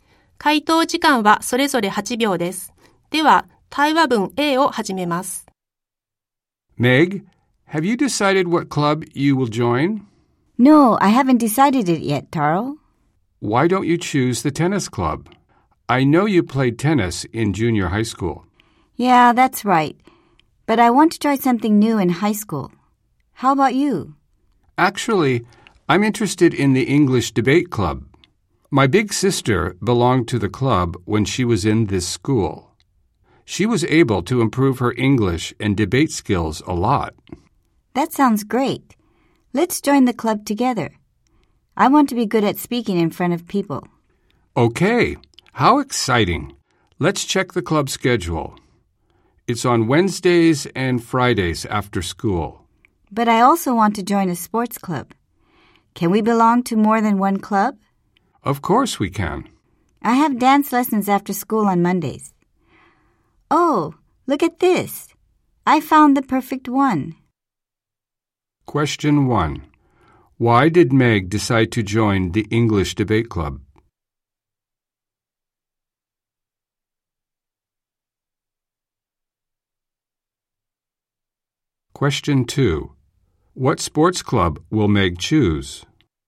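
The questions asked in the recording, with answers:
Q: Why did Meg decide to join the English debate club?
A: She wants to be good at speaking in front of people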